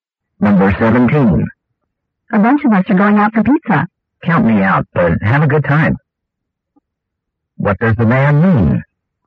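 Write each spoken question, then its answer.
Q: What does the man mean?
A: He won't go for pizza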